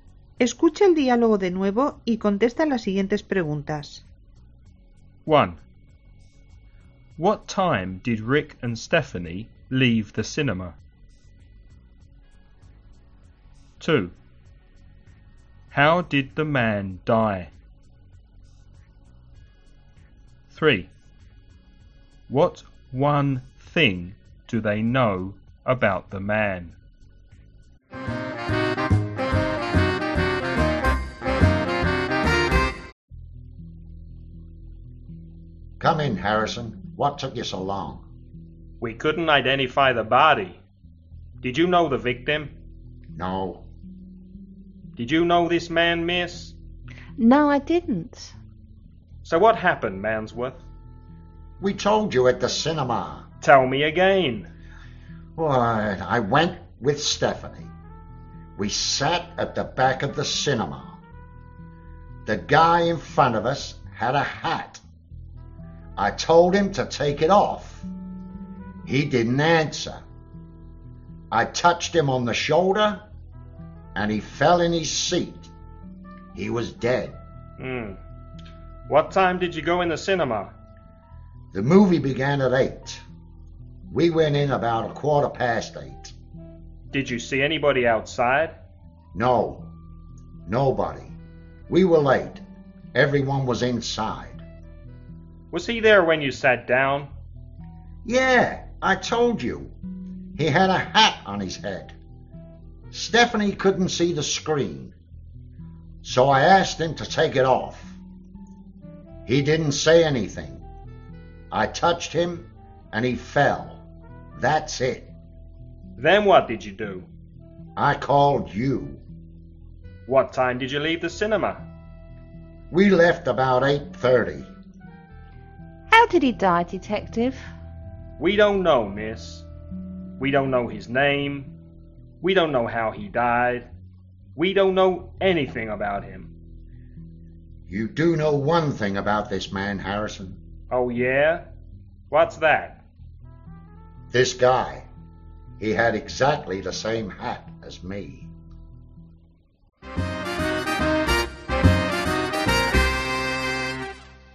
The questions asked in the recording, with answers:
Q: What time did Rick and Stephanie leave the cinema?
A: They left about 8:30.

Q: How did the man die?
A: They don't know.

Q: What one thing do they know about the man?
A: He had exactly the same hat as Rick.